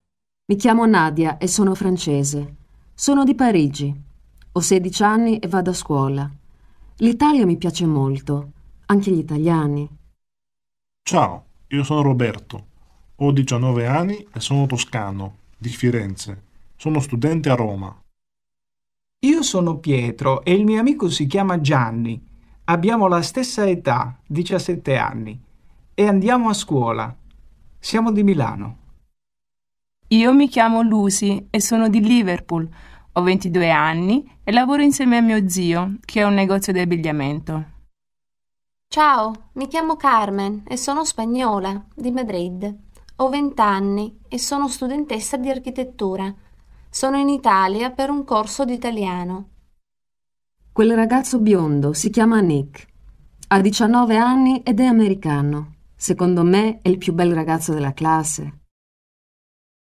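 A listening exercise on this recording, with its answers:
Ascolta l'audio e rispondi alle domande. [Listen to the audio file and answer the following questions].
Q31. Nadia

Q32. Roberto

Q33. Lucy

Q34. Carmen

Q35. Nick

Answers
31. è francese, di Parigi, ha 16 anni e va a scuola
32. ha 19 anni, è di Firenze e studia a Roma
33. è di Liverpool, ha 22 anni e lavora nel negozio di abbigliamento dello zio
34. è spagnola, di Madrid, ha 20 anni e studia architettura
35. è americano, biondo e ha 19 anni

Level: CEFR levels : A1.1 - A1.5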